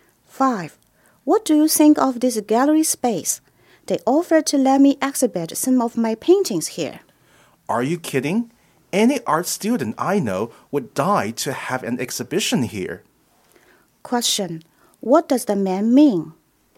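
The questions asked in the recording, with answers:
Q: What does the man mean?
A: It is a great opportunity to exhibit there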